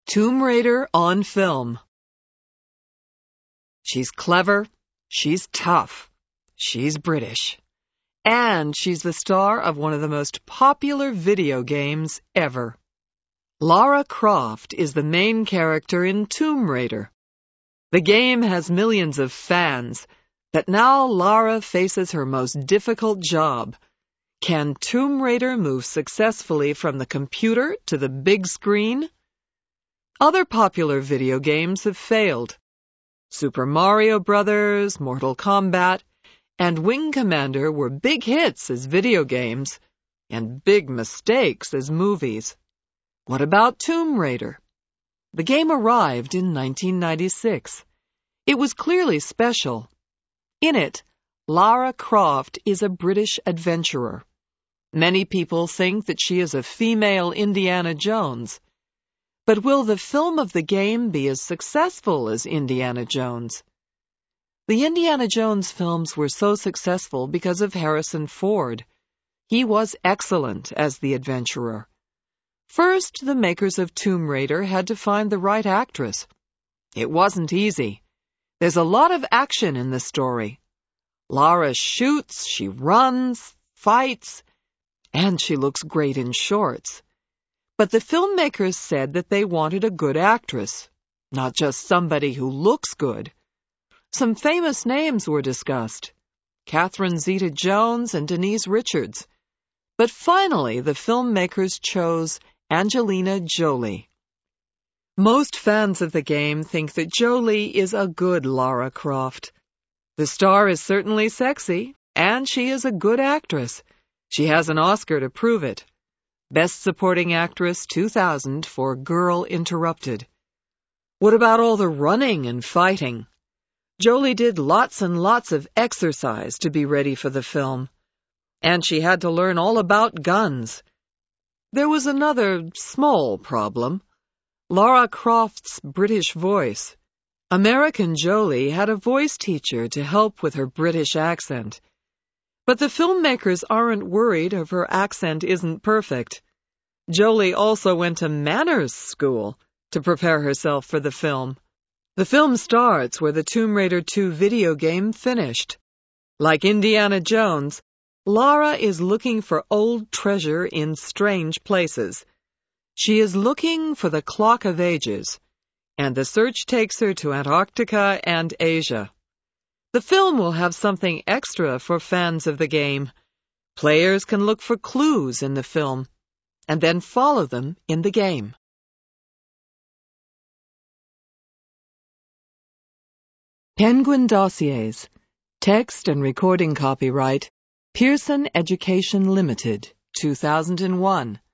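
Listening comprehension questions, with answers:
Answer these questions TRUE or FALSE:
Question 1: Video games always make great movies.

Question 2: Catherine Zeta-Jones is in Tomb Raider.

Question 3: Angelina Jolie is British.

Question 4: Indiana Jones is in Tomb Raider.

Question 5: Lara Croft is very fit.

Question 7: There are clues for the game in the Tomb Raider film.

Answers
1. FALSE
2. FALSE
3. FALSE
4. FALSE
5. TRUE
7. TRUE

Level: LOW INTERMEDIATE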